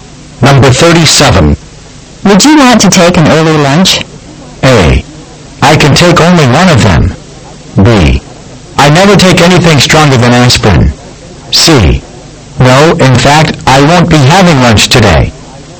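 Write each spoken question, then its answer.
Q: Would you want to take an early lunch?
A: C: No, in fact, I won't be having lunch today.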